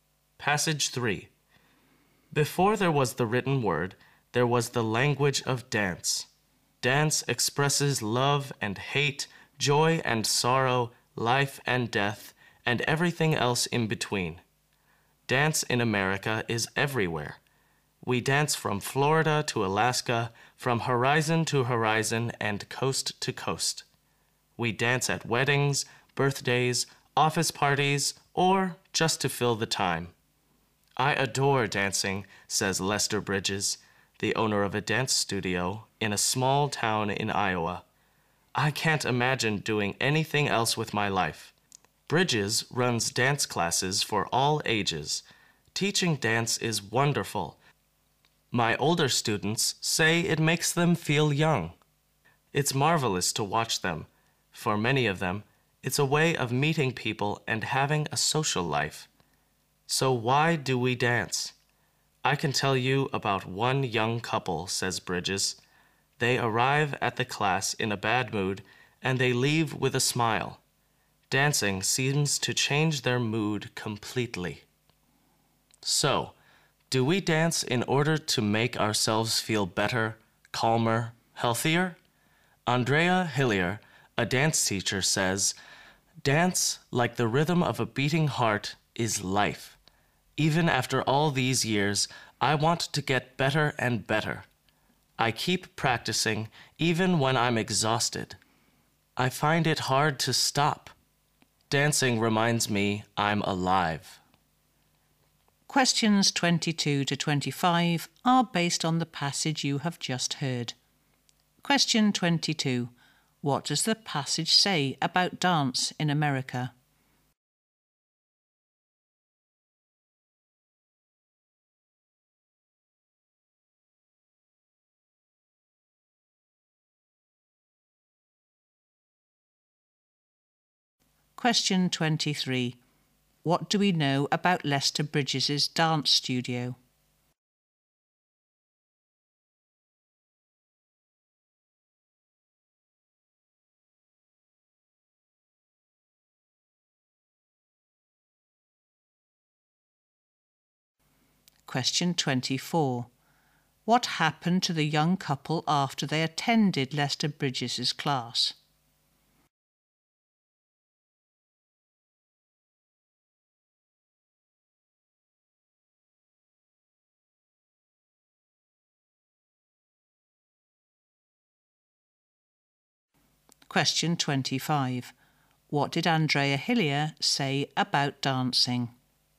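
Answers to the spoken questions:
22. It is everywhere
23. It runs dance classes for all ages
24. Their mood changed; they left with a smile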